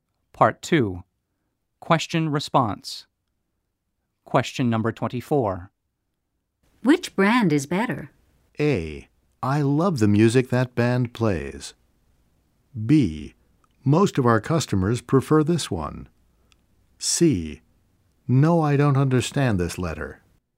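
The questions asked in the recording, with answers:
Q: Which band is better?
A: B: Most of our customers prefer this one.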